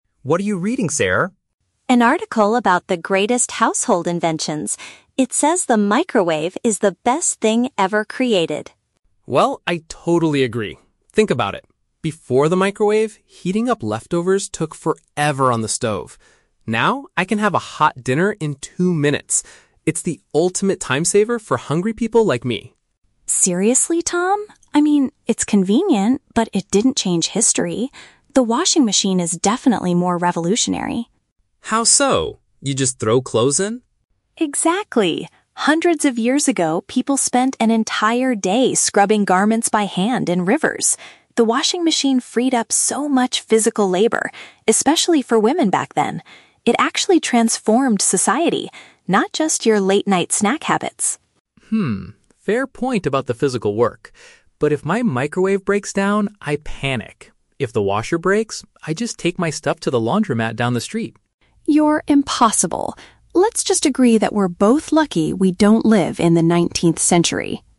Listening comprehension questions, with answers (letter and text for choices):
Listen to a conversation between a brother and sister discussing household inventions. For each question, choose the correct answer (A, B, or C).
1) According to Tom, what is the main benefit of the microwave?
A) It is much cheaper to buy than a standard stove.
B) It warms up meals extremely fast.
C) It helps him cook healthier late-night snacks.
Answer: B) It warms up meals extremely fast.

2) Why does Sarah believe the washing machine is a more significant invention?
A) It is the most complicated device to build.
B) It helps people wash their clothes at the laundromat.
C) It significantly reduced hard manual work.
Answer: C) It significantly reduced hard manual work.

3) What does Tom say he would do if his washing machine stopped working?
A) He would wash his clothes by hand.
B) He would take his clothes to a public washing facility.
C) He would panic and try to fix it immediately.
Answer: B) He would take his clothes to a public washing facility.

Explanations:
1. Tom says, "I can have a hot dinner in two minutes. It's the ultimate time-saver." Option (B) is a paraphrase of this idea. Option (A) is a trap; the word "stove" is mentioned in the audio, but they never talk about the price. Option (C) is plausible but not mentioned (he mentions "snack habits" but never says the food is "healthier").
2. Sarah explains that the washing machine "freed up so much physical labor." Option (C) paraphrases "physical labor" as "manual work." Option (A) is not mentioned. Option (B) is a trap because the "laundromat" is mentioned later by Tom, not by Sarah as a reason for the invention's importance.
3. Tom states, "If the washer breaks, I just take my stuff to the laundromat down the street." Option (B) uses synonyms ("public washing facility") for "laundromat". Option (A) is a trap; "by hand" is mentioned by Sarah when talking about the past, not Tom's current plan. Option (C) is a trap; Tom says he would "panic" if the microwave breaks, not the washer.

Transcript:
Tom: What are you reading, Sarah?
Sarah: An article about the greatest household inventions. It says the microwave is the best thing ever created.
Tom: Well, I totally agree! Think about it. Before the microwave, heating up leftovers took forever on the stove. Now, I can have a hot dinner in two minutes. It's the ultimate time-saver for hungry people like me.
Sarah: Seriously, Tom? I mean, it's convenient, but it didn't change history. The washing machine is definitely more revolutionary.
Tom: How so? You just throw clothes in.
Sarah: Exactly! Hundreds of years ago, people spent an entire day scrubbing garments by hand in rivers. The washing machine freed up so much physical labor, especially for women back then. It actually transformed society, not just your late-night snack habits.
Tom: Hmm, fair point about the physical work. But if my microwave breaks down, I panic. If the washer breaks, I just take my stuff to the laundromat down the street.
Sarah: You're impossible! Let's just agree that we're both lucky we don't live in the nineteenth century.